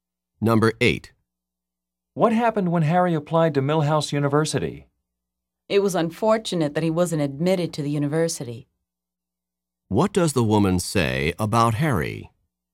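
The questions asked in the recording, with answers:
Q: What does the woman say about Harry?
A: Unfortunately he was not admitted.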